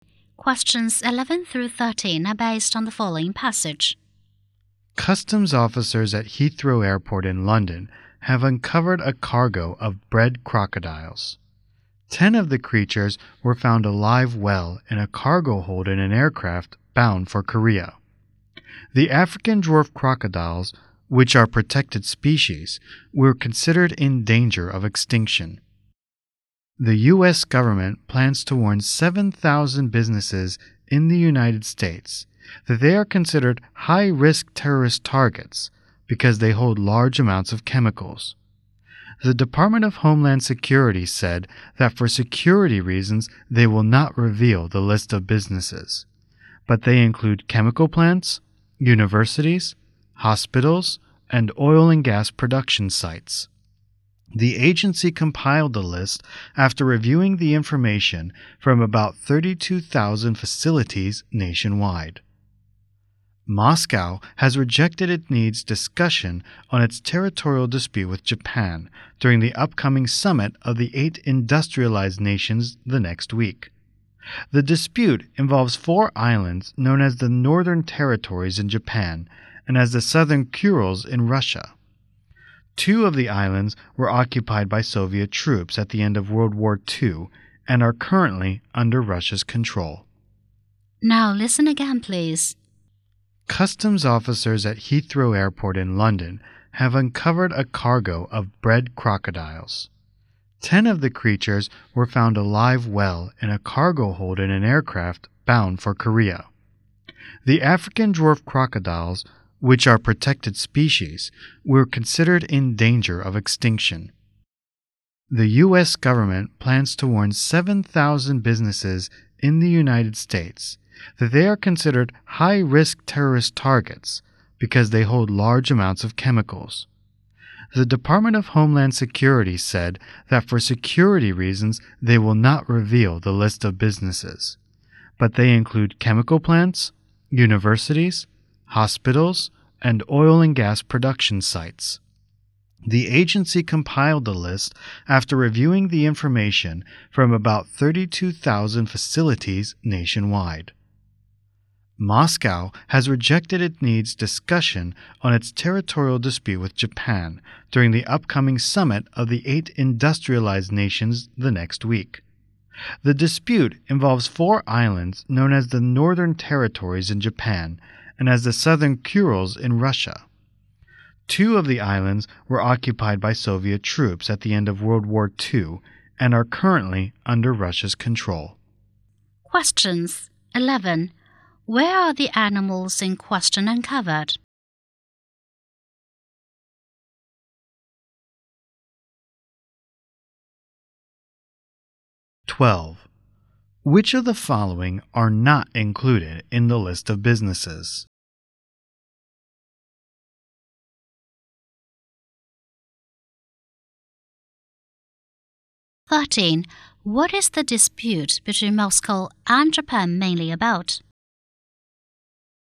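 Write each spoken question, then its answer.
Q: Where are the animals in question uncovered?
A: In a cargo hold of an aircraft at Heathrow Airport

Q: What is the dispute between Moscow and Japan mainly about?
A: Four islands (territory)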